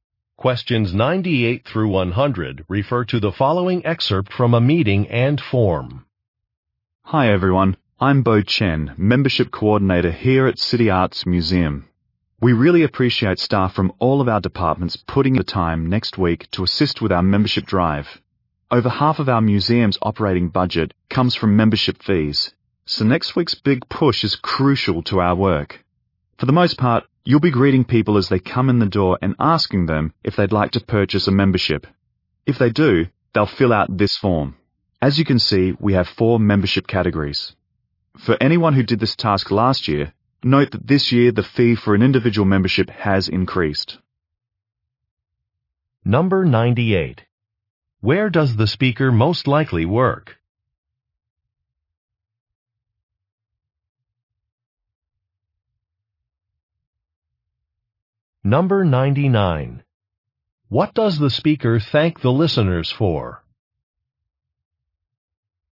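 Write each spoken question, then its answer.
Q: Where does the speaker most likely work?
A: At a museum

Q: What does the speaker thank the listeners for?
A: Helping with the membership drive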